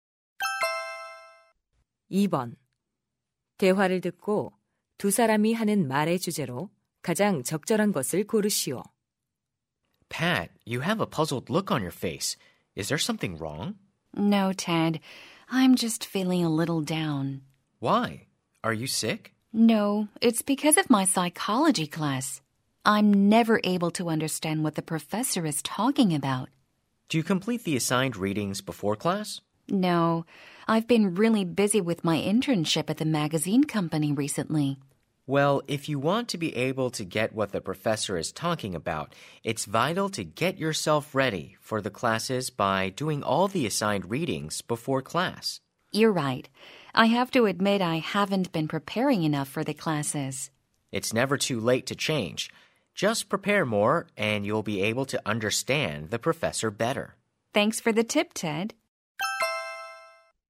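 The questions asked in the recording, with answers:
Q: 대화를 듣고 두 사람이 하는 말의 주제로 가장 적절한 것을 고르시오.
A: 수업 전 과제 읽기를 통한 수업 준비의 중요성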